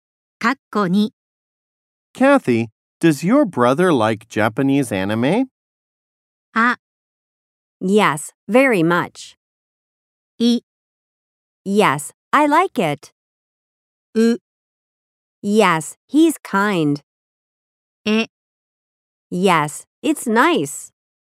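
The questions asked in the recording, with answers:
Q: Kathy, does your brother like Japanese anime?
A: あ: Yes, very much.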